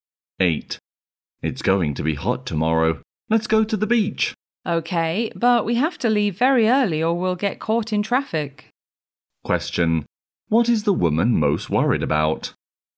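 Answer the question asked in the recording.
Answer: Getting caught in traffic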